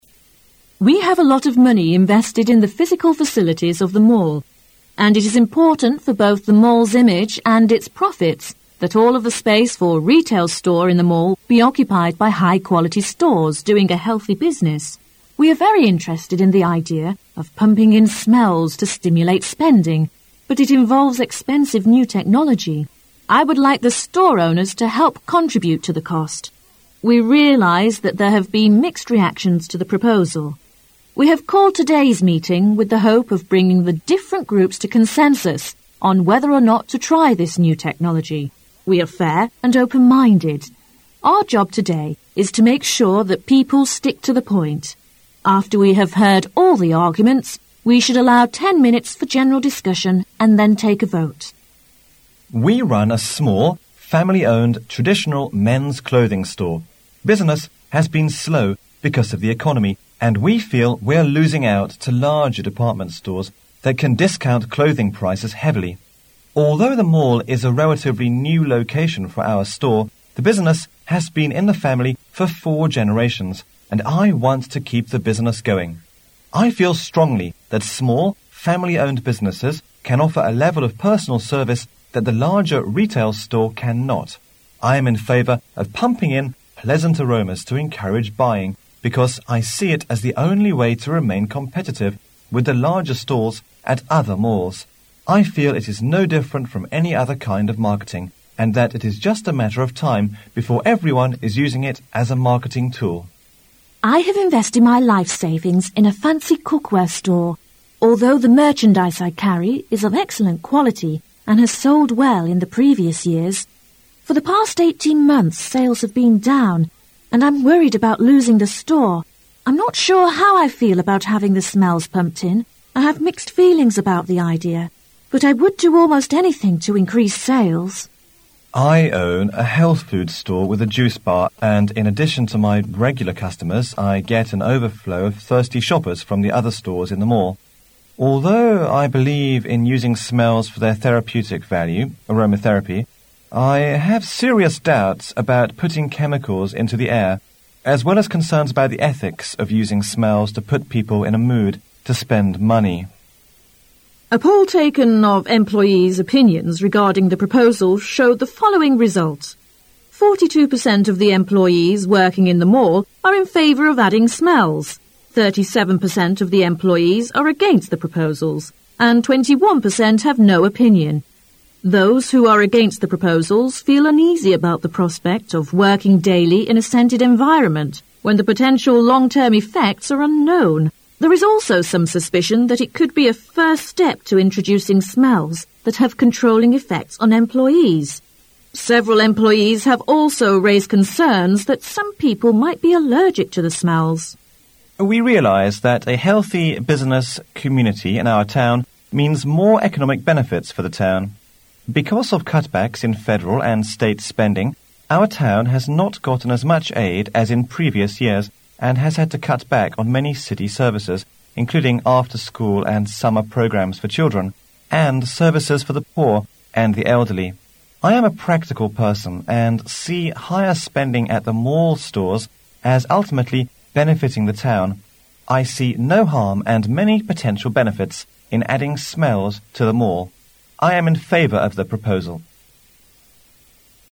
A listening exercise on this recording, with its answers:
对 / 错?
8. Those who are for the proposal said they had to do something to increase sales.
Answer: 对

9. The town people have not gotten as much aid as in previous years from the government.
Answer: 对

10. More than half of the employees are concerned about the ethics of using smells to put people in a mood to spend money.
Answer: 错

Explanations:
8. 那些赞成此举的人认为必须要做些事情促进销售。
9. 根据市政府代表的说法现在政府给市民的投资不像以前那么多了。
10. 只有少数几位员工关心向空中喷洒香水以促进销售,从顾客兜里掏钱是否符合商业道德规范。

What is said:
A
[解析] 1-10 Mall Owner: We have a lot of money invested in the physical facilities of the mall, and it is important for both the mall's image and its profits that all of the space for retail store in the mail be occupied by high-quality stores doing a healthy business. We are very interested in the idea of pumping in smells to stimulate spending, but it involves expensive new technology. I would like the store-owners to help contribute to the cost. We realize that there have been mixed reactions to the proposal. We have culled today's meeting with the hope of bringing the different groups to consensus on whether or not to try this new technology. We are fair and open-minded. Our job today is to make sure that people stick to the point. After we have heard ail the arguments, we should allow ten minutes for general discussion and then take a vote. Board Member # 1, We run a small, family-owned traditional men's clothing store. Business has been slow because of the economy, and we feel we are losing out to larger department stores that can discount clothing prices heavily. Although the mail is a relatively new location for our store, the business has been in the family for four generations, and I want to keep the business going. I feel strongly that small, family-owned businesses can offer a level of personal service that the larger retail store cannot. I am in favor of ptunping in pleasant aromas to encourage buying because I see it as the only way to remain competitive with the larger stores at other malls. I feel it is no different from any other kind of marketing and that it is just a matter of time before everyone is using it as a marketing tool. Board Member #2: I have invested my life savings in a fancy cookware store. Although the merchandise I carry is of excellent quality and has sold well in the previous years, for the past l8 months sales have been down, and I am worried about losing the store. I am not sure how I feel about having the smells pumped in. I have mixed feelings about the idea, but I would do almost anything to increase sales. Board Member #3: I own a health-food store with a juice bar, and in addition to my regular customers, I get an overflow of thirsty shoppers from the other stores in the mall. Although I believe in using smells for their therapeutic value ( aroma therapy), I have serious doubts about putting chemicals into the air as well as concerns about the ethics of using smells to put people in a mood to spend money. Employee Representative: A poll taken of employees' opinions regarding the proposals showed the following result: 42 percent of the employees working in the mall are in favor of adding smells; 37 percent of the employees are against the proposals; and 21 percent have no opinion. Those who are against the proposals feel uneasy about the prospect of working daily in a scented environment, when the potential long term effects are unknown. There is also some suspicion that it could he a first step to introducing smells that have controlling effects on employees. Several employees have also raised concerns that some people might be allergic to the smells. Local City Council Representative: We realize that a healthy business community in our town means more economic benefits for the town. Because of cutbacks in federal and state spending, our town has not gotten as much aid as in previous years and has had to cut back on many city services, including after school and summer programs for children and services for the poor and the elderly. I am a practical person and see higher spending at the mall stores as ultimately benefiting the town. I see no harm and many potential benefits in adding smells to the mall.